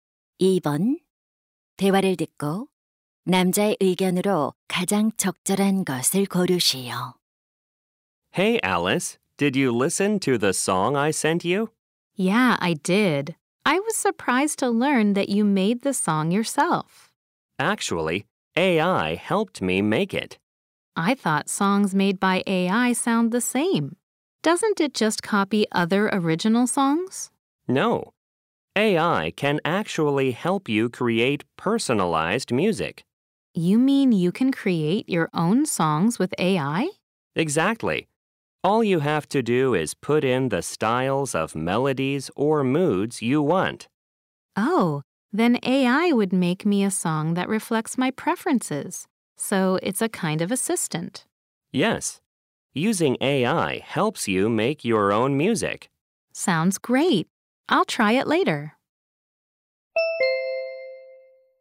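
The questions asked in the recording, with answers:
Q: 대화를 듣고 남자의 의견으로 가장 적절한 것을 고르시오.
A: AI를 활용하면 자신만의 음악을 만들 수 있다.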